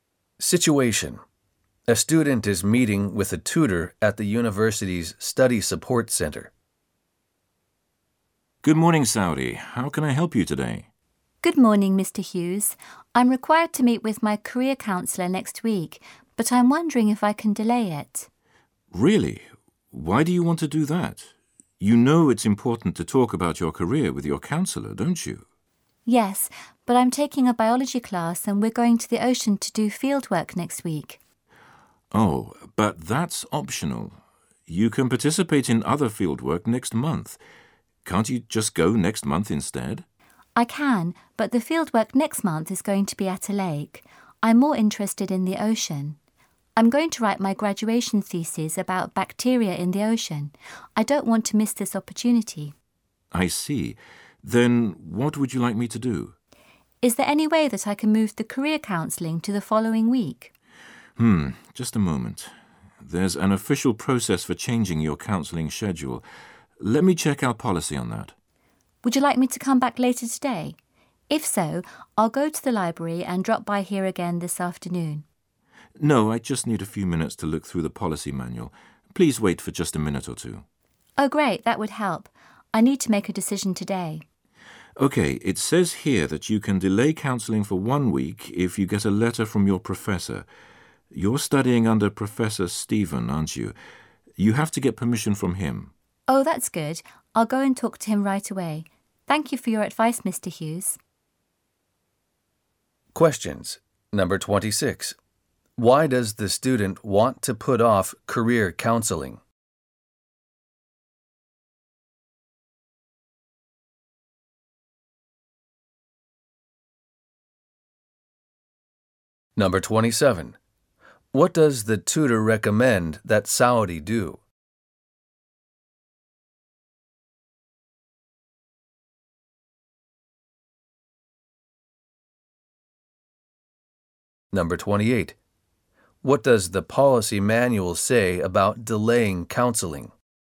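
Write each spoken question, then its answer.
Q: Why does the student want to put off career counseling?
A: To go on biology field work at the ocean next week

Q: What does the policy manual say about delaying counseling?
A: It can be delayed one week with a letter from the professor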